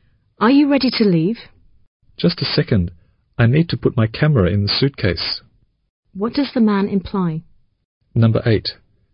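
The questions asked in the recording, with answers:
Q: What does the man imply?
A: He is almost ready; he just needs to pack his camera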